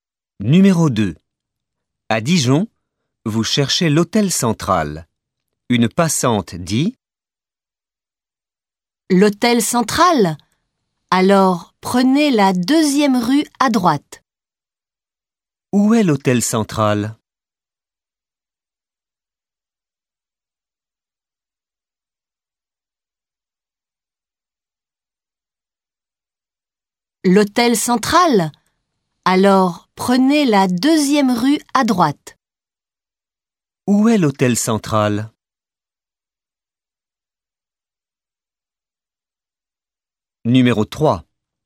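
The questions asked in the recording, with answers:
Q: Où est l'hôtel central ?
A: La deuxième rue à droite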